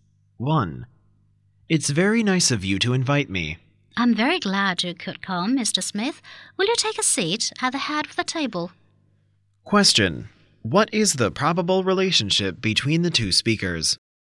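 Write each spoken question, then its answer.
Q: What is the probable relationship between the two speakers?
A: Host and guest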